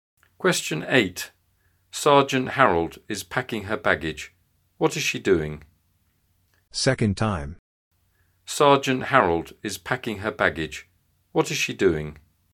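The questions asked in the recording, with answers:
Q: What is she doing?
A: Packing her baggage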